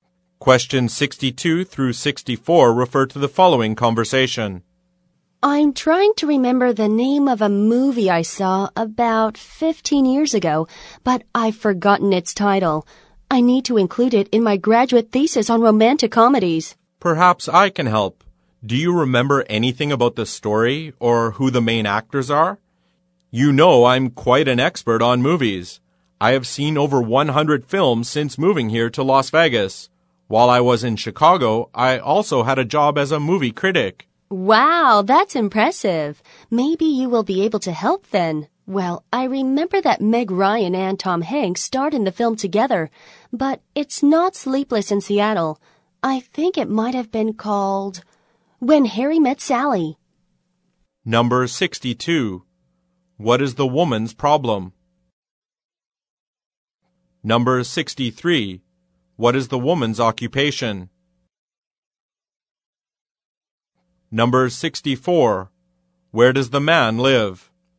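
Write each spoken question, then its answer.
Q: What is the woman's problem?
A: She has forgotten the title of a movie

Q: Where does the man live?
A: Las Vegas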